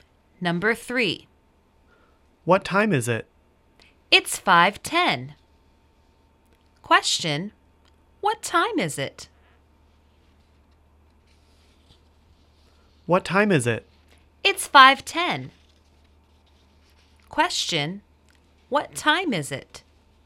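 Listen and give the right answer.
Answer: 5:10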